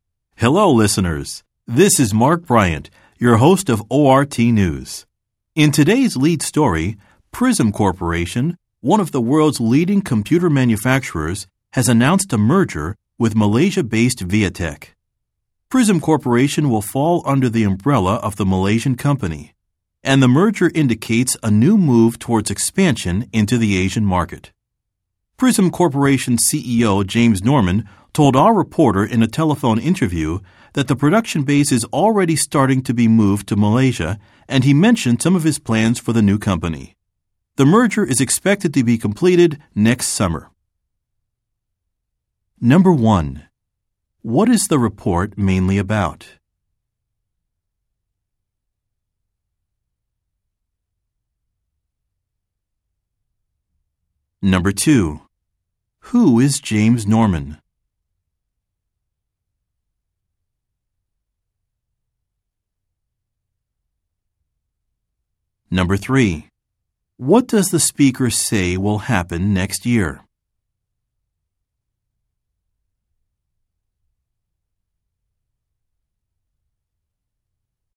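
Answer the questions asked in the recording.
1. A merger between Prism Corporation and Viatek
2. The CEO of Prism Corporation
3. The merger will be completed next summer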